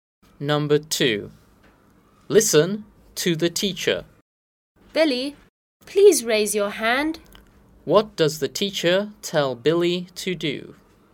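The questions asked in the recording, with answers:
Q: What does the teacher tell Billy to do?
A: Raise his hand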